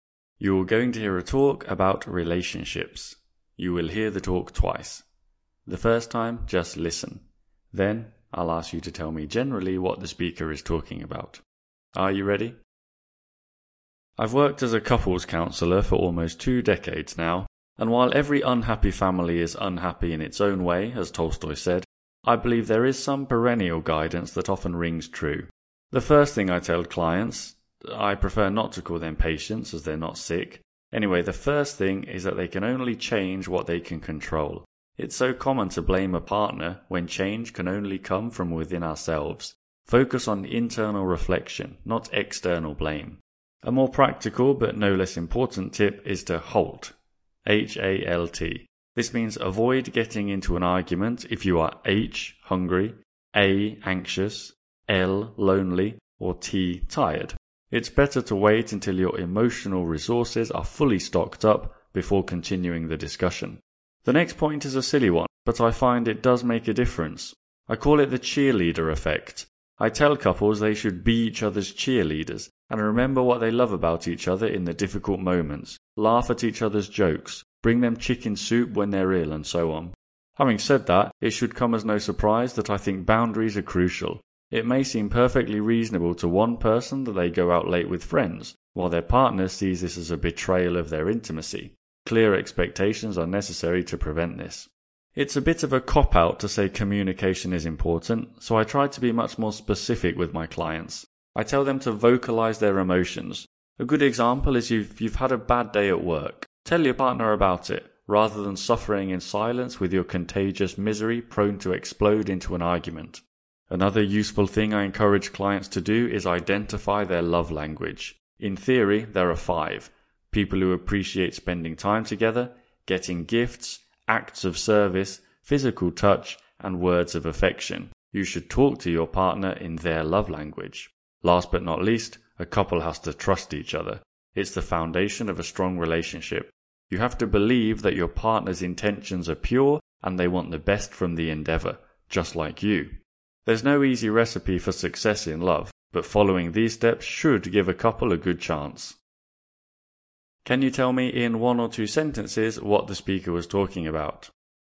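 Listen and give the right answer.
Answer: A couples counsellor giving tips for a healthy relationship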